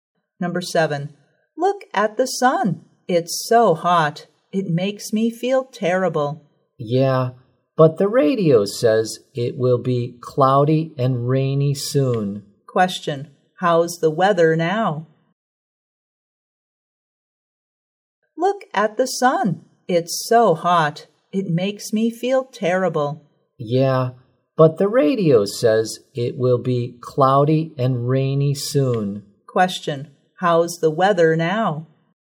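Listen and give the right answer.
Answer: Sunny and hot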